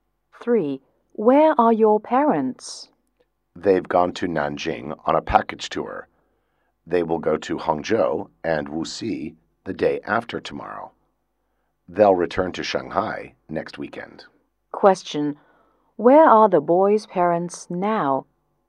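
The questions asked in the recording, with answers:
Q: Where are the boys' parents now?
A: In Nanjing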